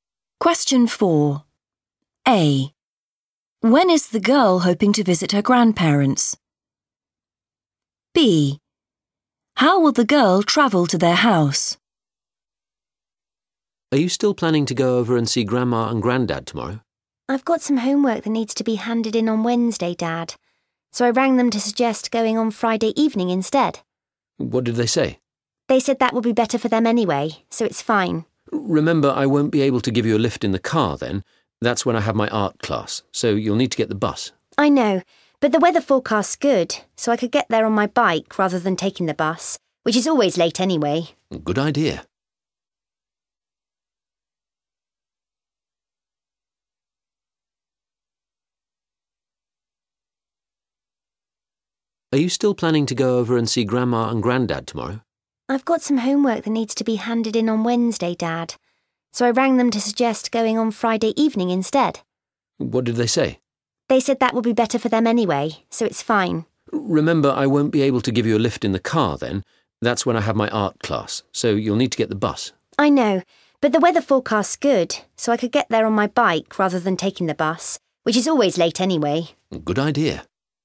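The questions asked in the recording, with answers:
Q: When is the girl hoping to visit her grandparents?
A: Friday evening

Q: How will the girl travel to their house?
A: by bike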